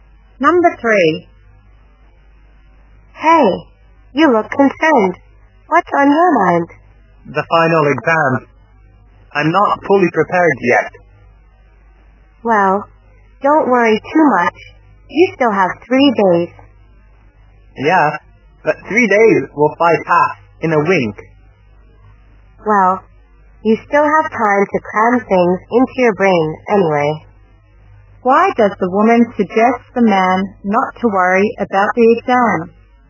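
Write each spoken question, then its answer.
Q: Why does the woman suggest the man not to worry about the exam?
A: He still has 3 days to prepare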